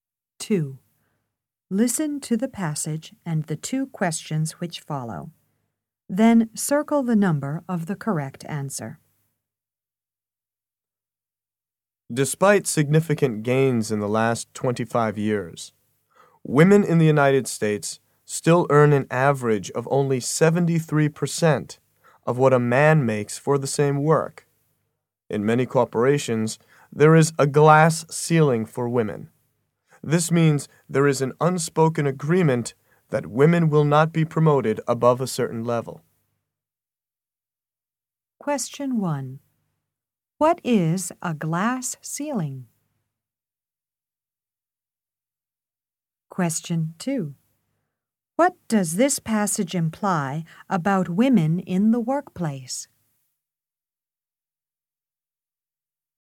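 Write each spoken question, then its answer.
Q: What is a glass ceiling?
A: An unspoken agreement that women will not be promoted above a certain level

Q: What does this passage imply about women in the workplace?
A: They still face unequal treatment in pay and promotion.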